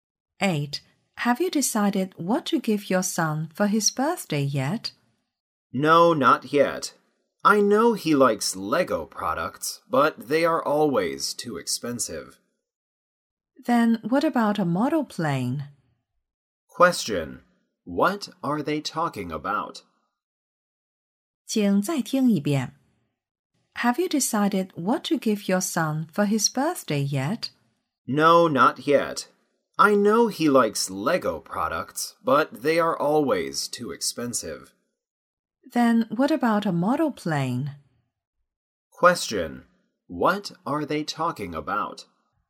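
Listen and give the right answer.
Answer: A birthday present for the woman's son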